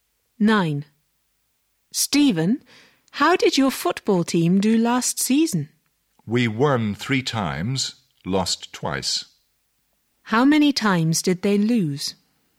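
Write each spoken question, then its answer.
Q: How many times did they lose?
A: Twice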